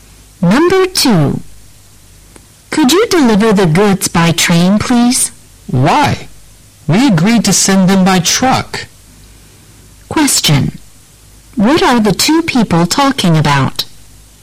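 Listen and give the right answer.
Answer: How to deliver the goods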